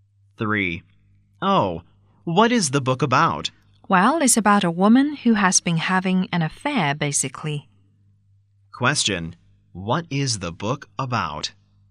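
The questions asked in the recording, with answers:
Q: What is the book about?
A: A woman who has been having an affair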